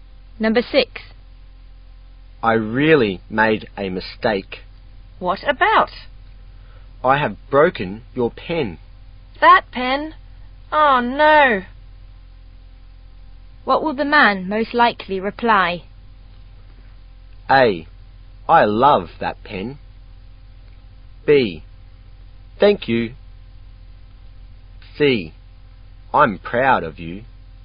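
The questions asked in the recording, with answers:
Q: What will the man most likely reply?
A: D: I'm very sorry.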